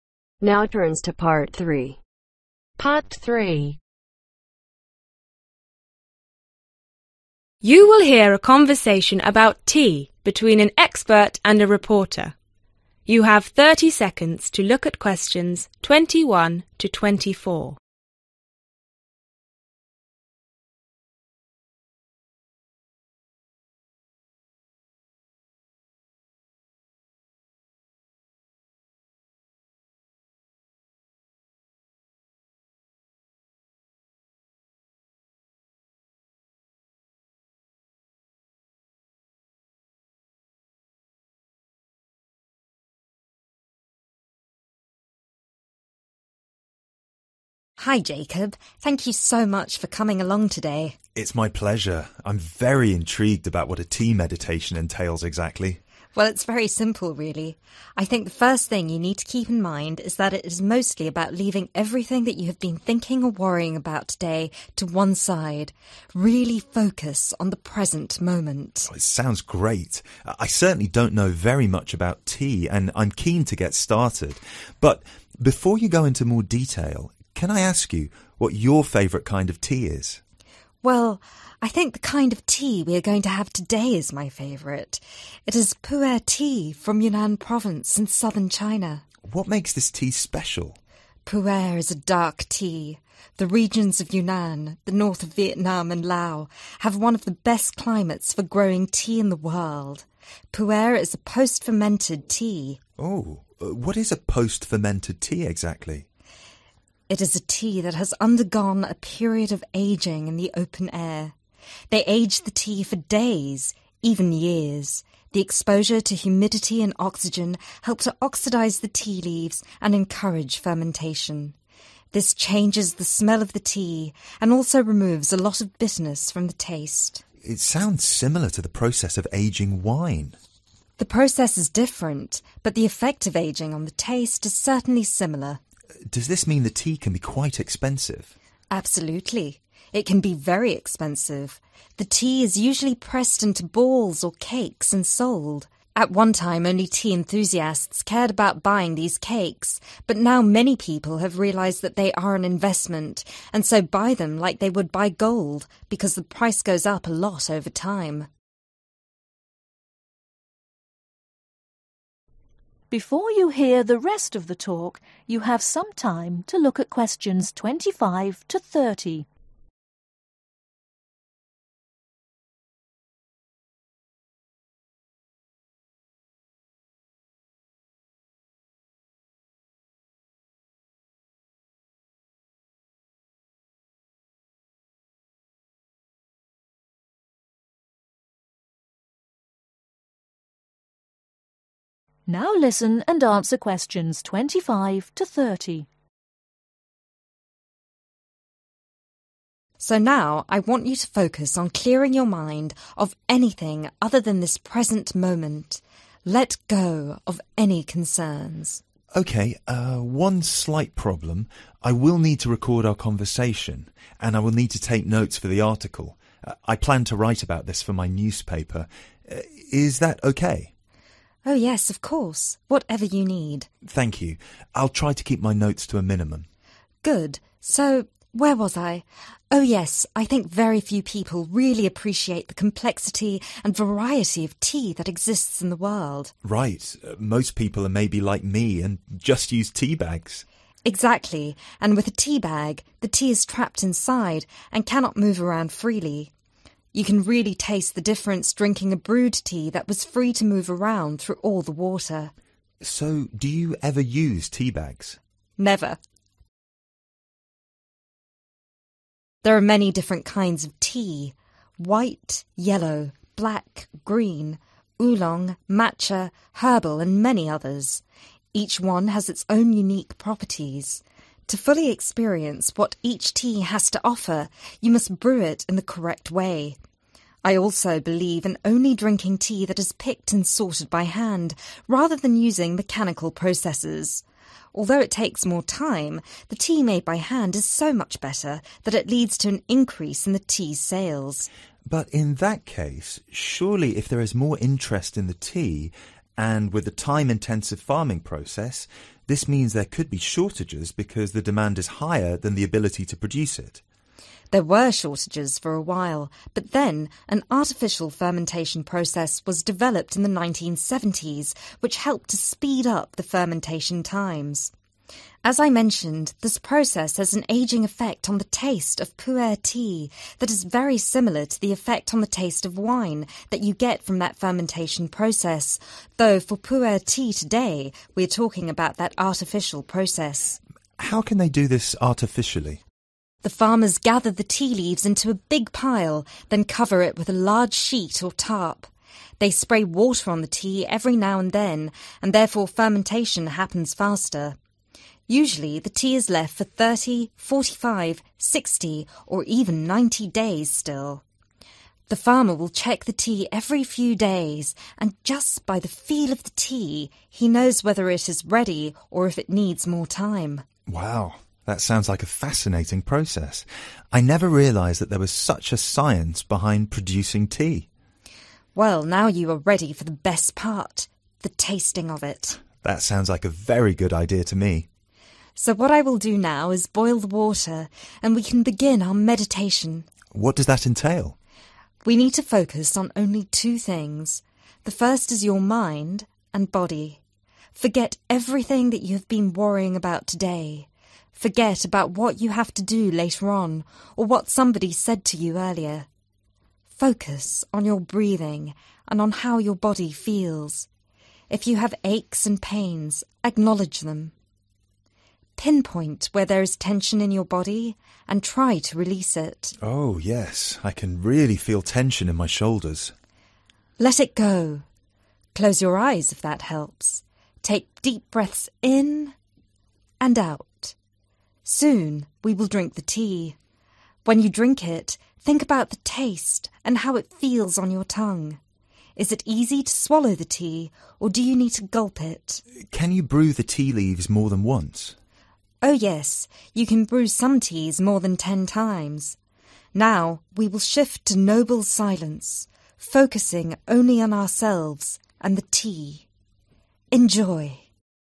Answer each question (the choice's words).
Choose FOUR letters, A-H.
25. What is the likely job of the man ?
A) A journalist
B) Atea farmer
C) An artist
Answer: A journalist

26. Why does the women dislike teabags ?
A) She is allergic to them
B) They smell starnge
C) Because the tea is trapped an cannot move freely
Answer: Because the tea is trapped an cannot move freely

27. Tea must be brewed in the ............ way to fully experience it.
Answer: correct

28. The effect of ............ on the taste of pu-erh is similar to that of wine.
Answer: aging

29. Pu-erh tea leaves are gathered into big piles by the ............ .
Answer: farmers

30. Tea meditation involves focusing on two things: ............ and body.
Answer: mind